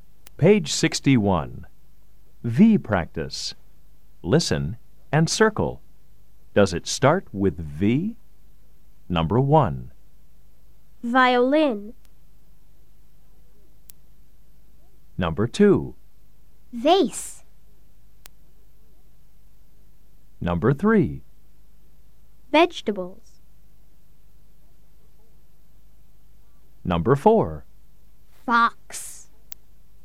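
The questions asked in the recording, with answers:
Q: Does it start with V? Number 1. Violin.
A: Yes

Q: Vase.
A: Yes

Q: Vegetables.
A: Yes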